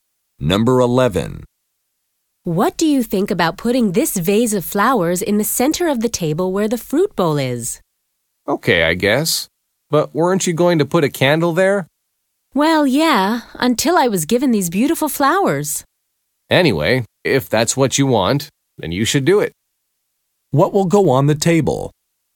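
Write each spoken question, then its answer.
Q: What will go on the table?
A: The vase of flowers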